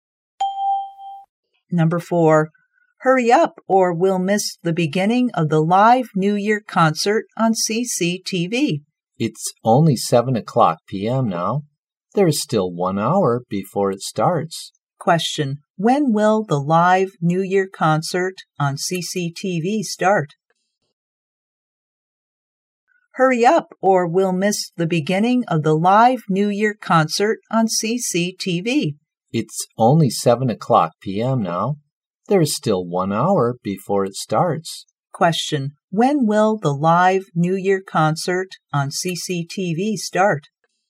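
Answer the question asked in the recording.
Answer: At 8 o'clock p.m.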